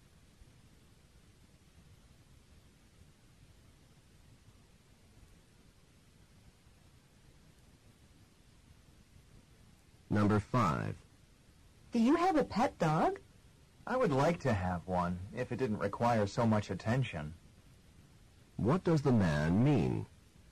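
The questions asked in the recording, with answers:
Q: What does the man mean?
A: He has no dog because it requires too much attention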